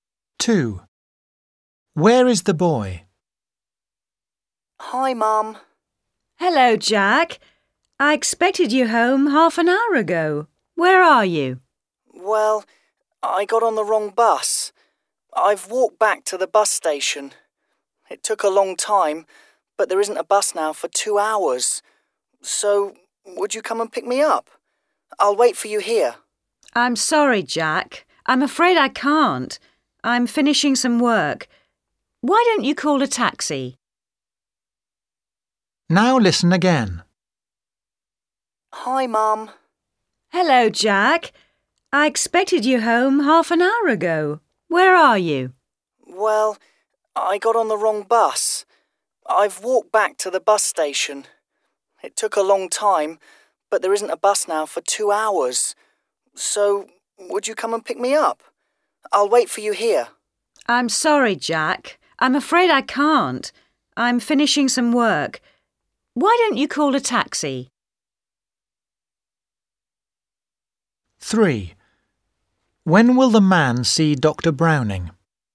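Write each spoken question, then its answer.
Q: Where is the boy?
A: at the bus station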